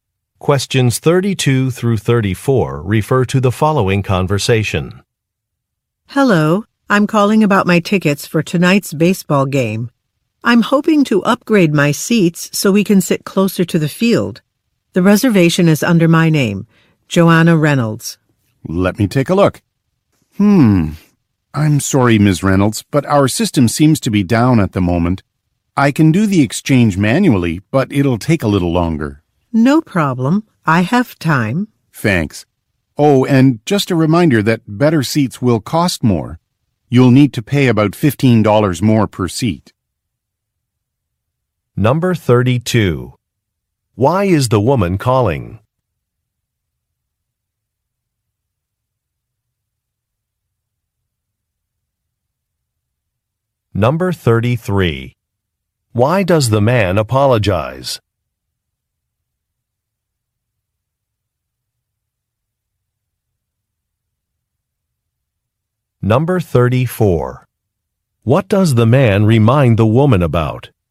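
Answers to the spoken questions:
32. To upgrade her seats for tonight's baseball game
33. The system is down
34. Better seats cost more (about $15 more per seat)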